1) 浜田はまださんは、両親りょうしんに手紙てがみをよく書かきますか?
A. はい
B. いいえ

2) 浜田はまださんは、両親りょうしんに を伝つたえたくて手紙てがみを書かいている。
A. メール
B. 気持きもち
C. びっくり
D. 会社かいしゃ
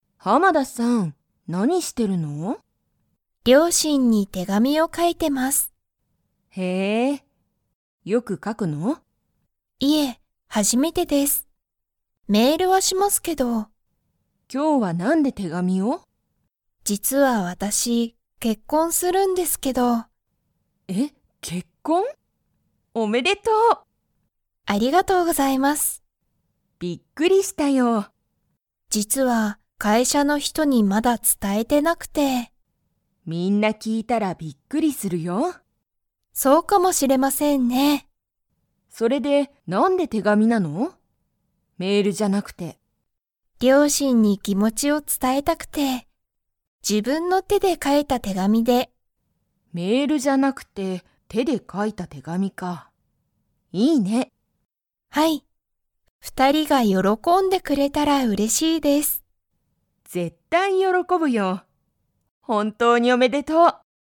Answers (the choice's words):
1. いいえ
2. 気持きもち

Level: Level 3